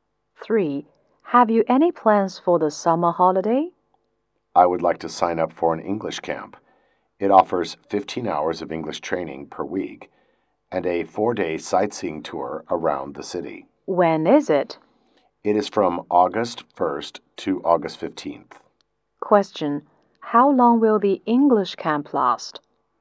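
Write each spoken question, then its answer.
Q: How long will the English camp last?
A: 15 days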